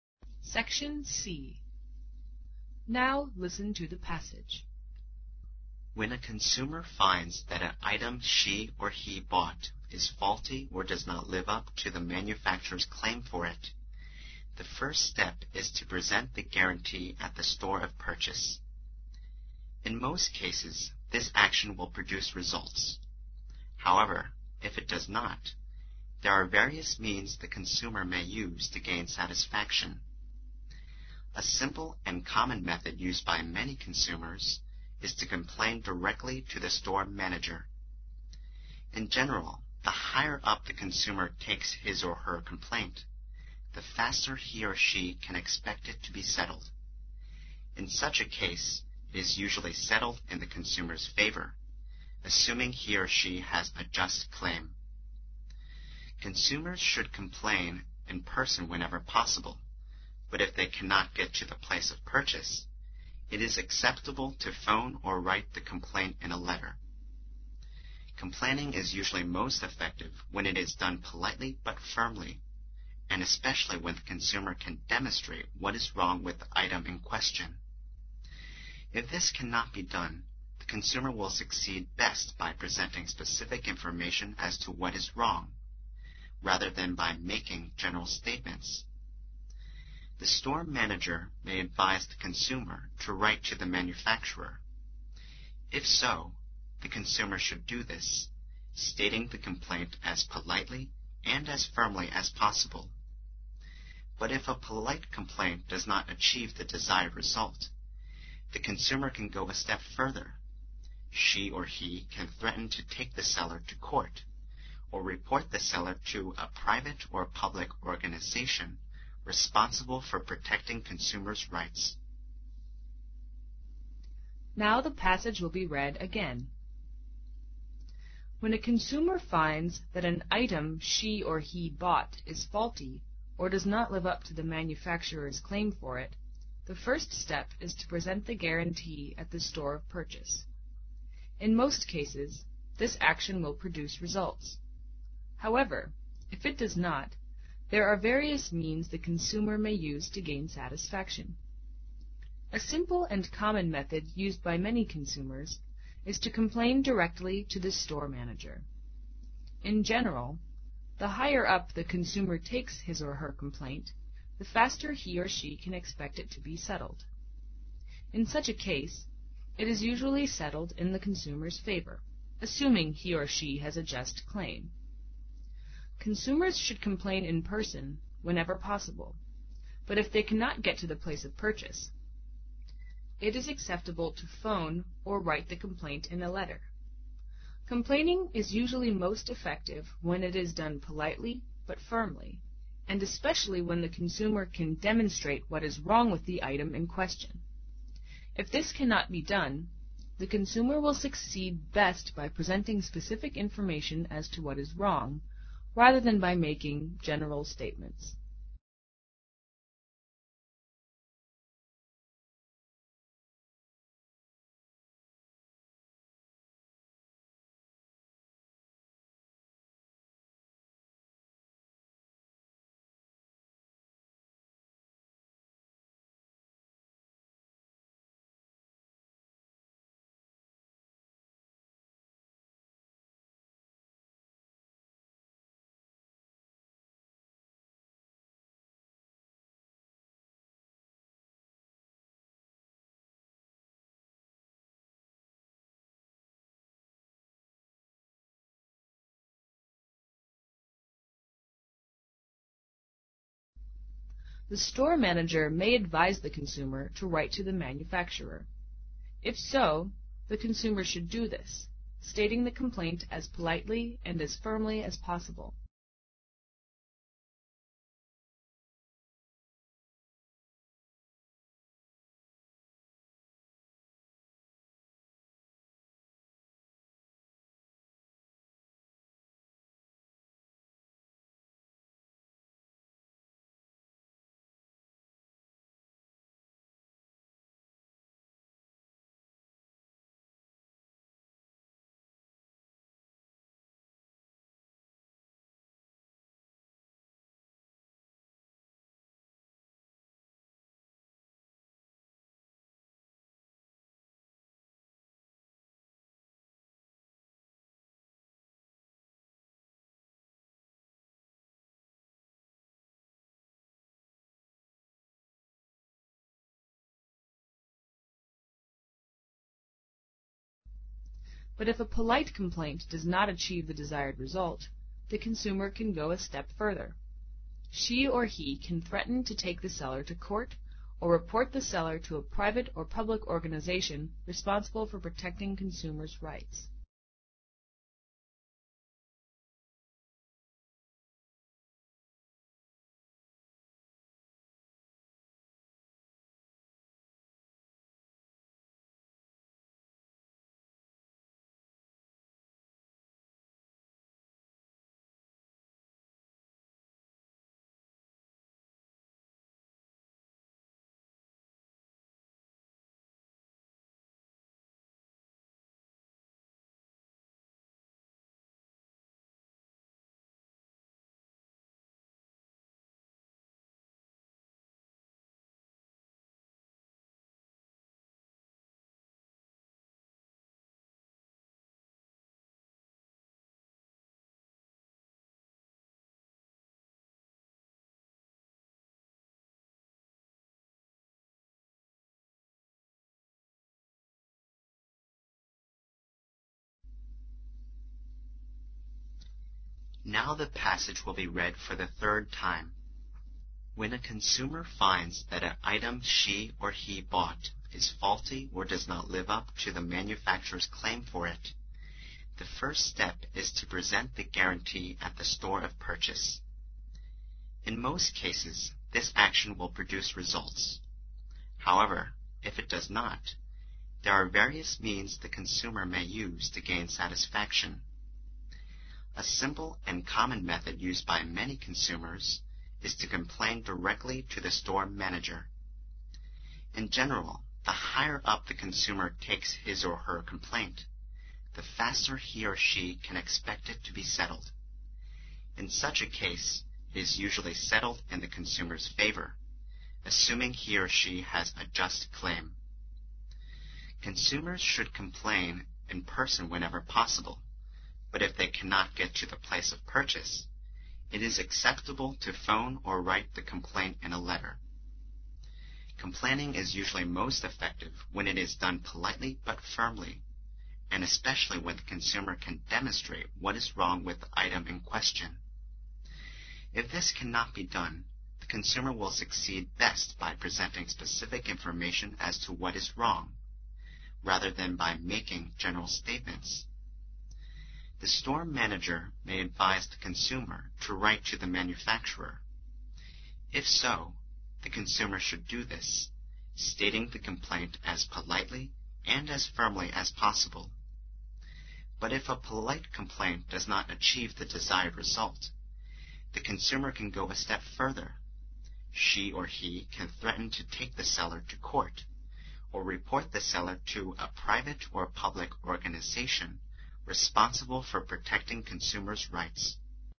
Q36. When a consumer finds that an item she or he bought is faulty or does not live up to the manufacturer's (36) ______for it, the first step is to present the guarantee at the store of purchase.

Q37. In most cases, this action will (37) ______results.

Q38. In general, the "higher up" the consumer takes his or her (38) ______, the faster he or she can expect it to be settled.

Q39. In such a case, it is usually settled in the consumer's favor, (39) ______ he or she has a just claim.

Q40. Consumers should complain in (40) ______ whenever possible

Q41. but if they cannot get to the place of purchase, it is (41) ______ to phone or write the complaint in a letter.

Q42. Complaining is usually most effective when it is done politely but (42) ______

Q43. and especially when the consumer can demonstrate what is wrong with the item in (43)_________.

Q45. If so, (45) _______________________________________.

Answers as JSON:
{"36": "claim", "37": "produce", "38": "complaint", "39": "assuming", "40": "person", "41": "acceptable", "42": "fimp3ly", "43": "question", "45": "the consumer should do this, stating the complaint as politely and as fimp3ly as possible"}

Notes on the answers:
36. 从manufacturer's这个所有结构可知所填词为名词,而且可以和介词for搭配。另外,live up to和所填词构成动宾搭配,live up to意为 "遵守(诺言、原则等),符合"。句中的or表示:faulty和or后面的部分是选择性并列关系。那么,consumer买的商品可能有瑕疵或者不像manufacturer标榜得那么好。claim作名词时常和for搭配,for后面的it指代的是an item。
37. 空前will限定所填词为一原形动词,并在句中作谓语,和results构成动宾搭配。主语this action是指上句中的present the guarantee at the store of purchase,在很多情况下,这种方式都比较有效。表示"产生好的效果"的搭配有produce / bring about / bear / give / yield (good) results。
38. 从in general(一般而言)可知,这句话是对上一句的进一步说明,所填词很可能和上一句中的关键词complain有关,而且作空后settled的宾语。Settle暗含"解决(棘手的或令人不愉快的事情)"。complaint是complain的名词形式,take one's complaint意为"抱怨",等同于complain。
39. 空前的句子结构已完整,所以本空应填一"动词+ing",即现在分词作伴随状语。
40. in person意为"亲自,本人",为固定短语。空后的转折句but if they cannot get to the place of purchase...to phone or write the complaint in a letter起提示作用。
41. 空前的It is及to phone...表明本空中应填一形容词。考生应注意:短文听写中若出现It is/was to do结构时,所填词往往为以able结尾的形容词。
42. 所填词前面的but表示"尽管...还是...",所填词和 politely应该词性相同,但意义相对。短文听写中的副词往往以ly结尾。
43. in question为固定搭配,意为"正在谈论的",修饰the item。在文章语境中,正在谈论的商品也就是顾客向经理抱怨的商品。

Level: 英语四级